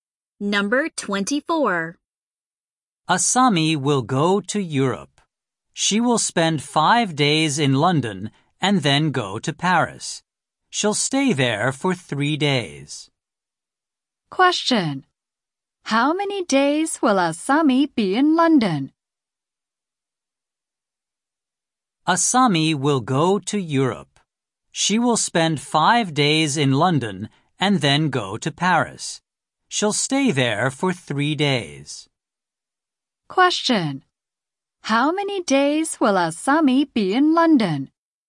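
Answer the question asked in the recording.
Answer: 5 days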